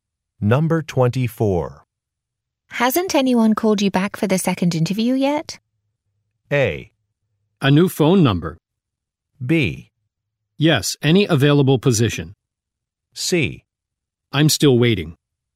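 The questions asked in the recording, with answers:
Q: Hasn't anyone called you back for the second interview yet?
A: C: I'm still waiting.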